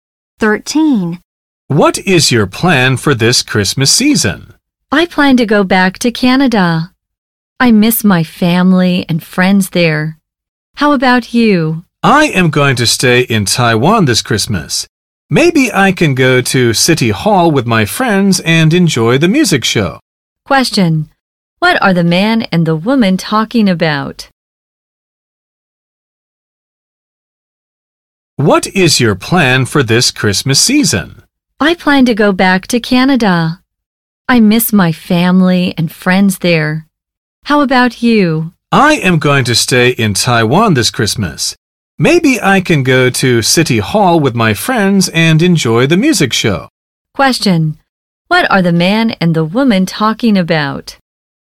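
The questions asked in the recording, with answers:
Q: What are the man and the woman talking about?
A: Their plans for Christmas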